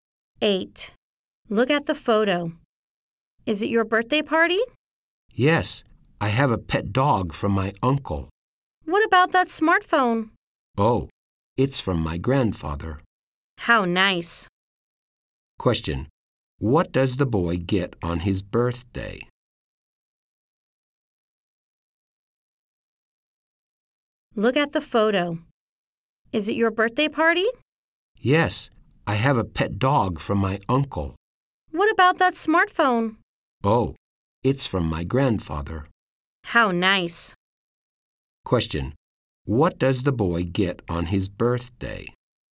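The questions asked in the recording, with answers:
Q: What does the boy get on his birthday?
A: A pet dog and a smartphone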